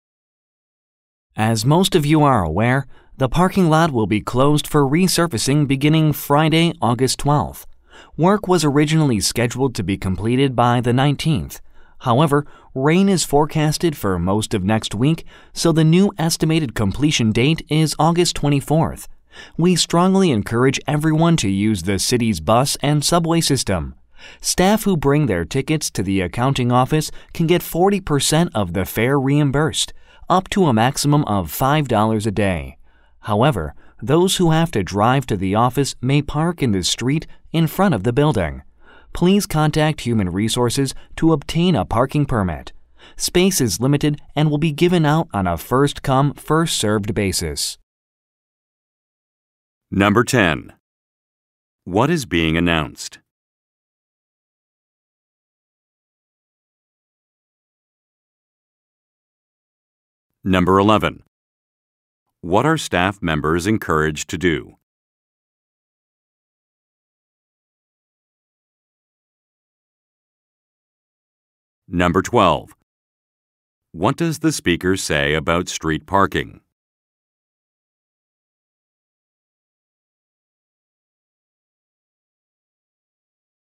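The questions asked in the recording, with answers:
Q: What is being announced?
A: The parking lot will be closed for resurfacing

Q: What are staff members encouraged to do?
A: Use the city's bus and subway system

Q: What does the speaker say about street parking?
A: It requires a permit from Human Resources, and space is limited (first-come, first-served)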